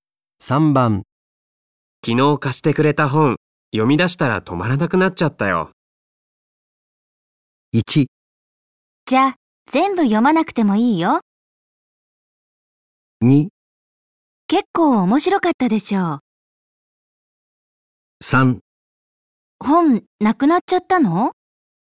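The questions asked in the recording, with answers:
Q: 昨日貸してくれた本、読み出したら止まらなくなっちゃったよ。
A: 2: 結構面白かったでしょう。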